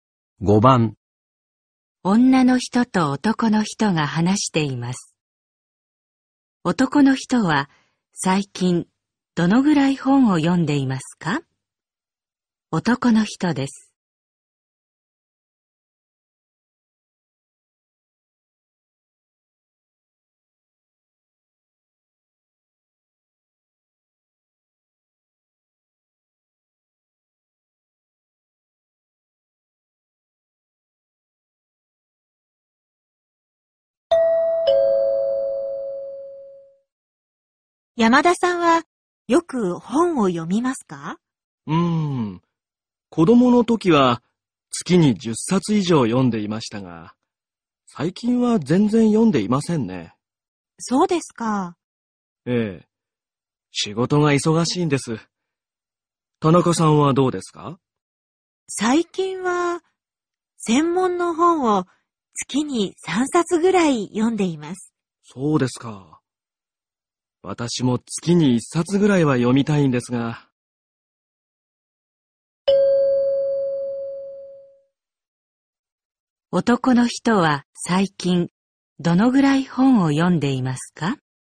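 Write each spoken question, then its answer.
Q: 男の人は最近どのぐらい本を読んでいますか?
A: 全然読んでいない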